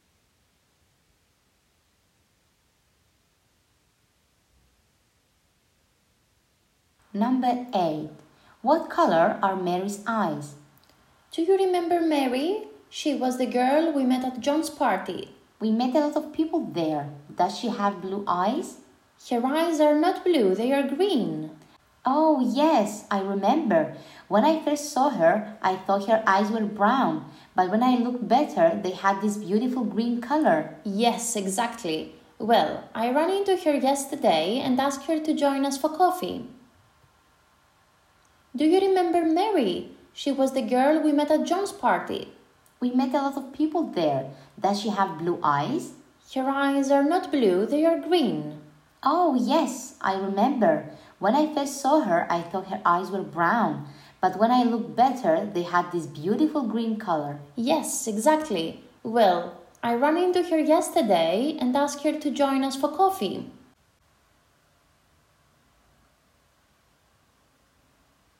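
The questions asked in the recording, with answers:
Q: What color are Mary's eyes?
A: Green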